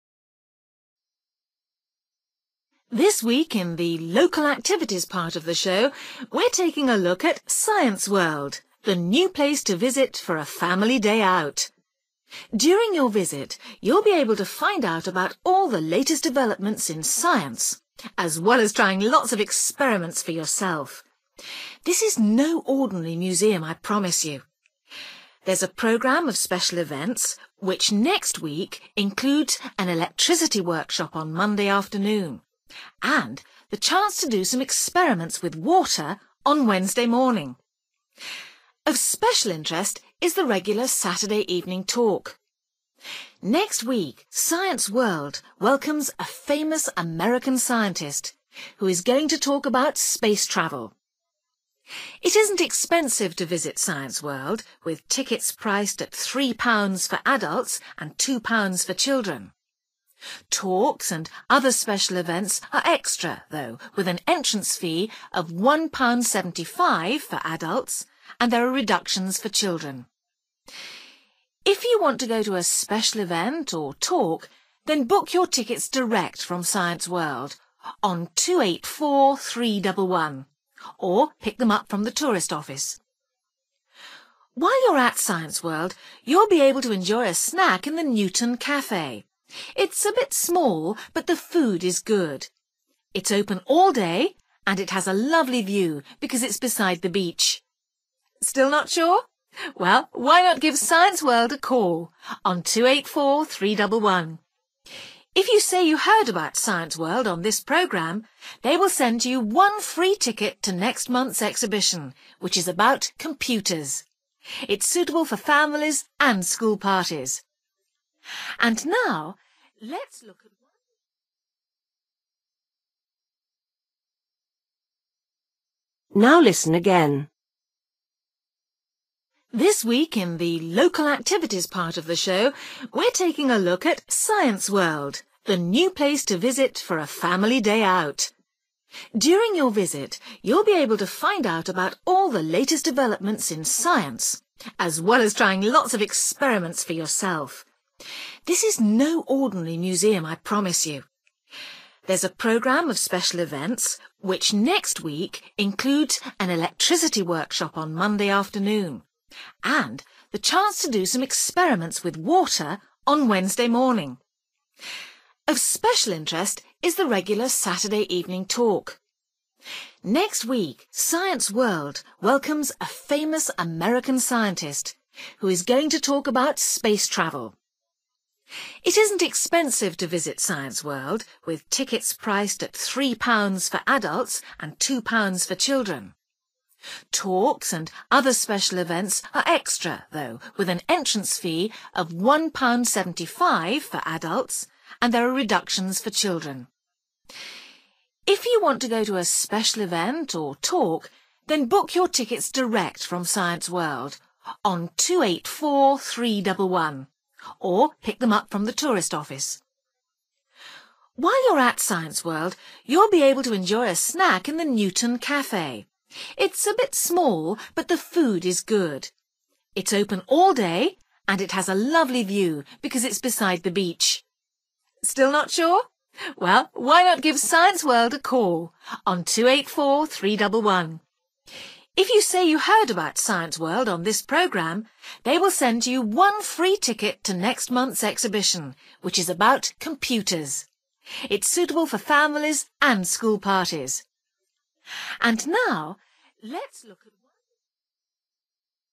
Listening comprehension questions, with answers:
For each question, fill in the missing information in the numbered space.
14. (14) .....................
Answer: Monday afternoon/p.m.

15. Talk about space travel by well-known scientist from (15) .....................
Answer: America / U.S.A. / United States (of America)

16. (16) £ ..................... Adults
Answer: £1.75

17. Get tickets direct from Science World on 284311, or from the (17) ..................... .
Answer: tourist office(s)

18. Newton Café is next to the (18) .....................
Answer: beach

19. Phone Science World for free ticket to exhibition about (19) ..................... .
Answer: computer(s)

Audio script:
Man: This week in the local activities part of the show, we're taking a look at Science World, the new place to visit for a family day out. During your visit you'll be able to find out about all the latest developments in science, as well as trying lots of experiments for yourself. This is no ordinary museum, I promise you! There's a programme of special events, which next week includes an Electricity Workshop on Monday afternoon, and the chance to do some experiments with water on Wednesday morning. Of special interest is the regular Saturday evening talk: next week Science World welcome a famous American scientist who is going to talk about space travel.
It isn't expensive to visit Science World, with tickets priced at three pounds for adults and two pounds for children. Talks and other special events are extra, though, with an entrance fee of £1.75 for adults and there are reductions for children. If you want to go to a special event or talk, then book your tickets direct from Science World on 284311, or pick them up from the tourist office.
While you're at Science World, you'll be able to enjoy a snack in the Newton Café – it's a bit small, but the food is good. It's open all day and it has a lovely view because it's beside the beach.
Still not sure? Well, why not give Science World a call on 284311? If you say you heard about Science World on this programme they will send you one free ticket to next month's exhibition which is about computers. It's suitable for families and school parties.
And now let's look at ...

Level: B1